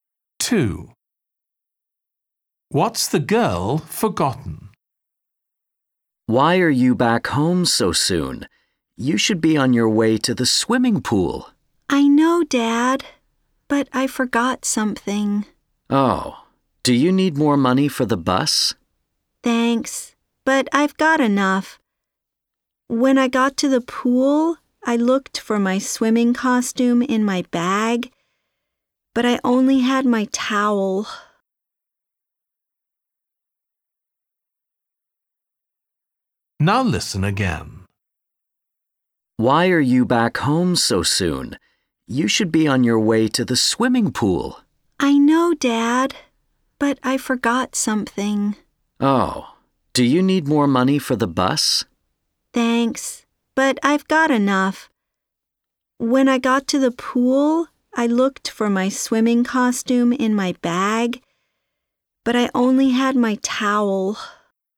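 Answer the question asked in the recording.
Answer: her swimming costume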